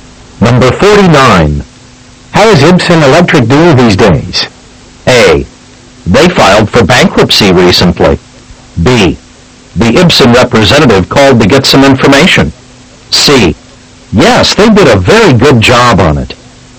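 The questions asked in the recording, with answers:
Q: How is Ibsen Electric doing these days?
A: A: They filed for bankruptcy recently.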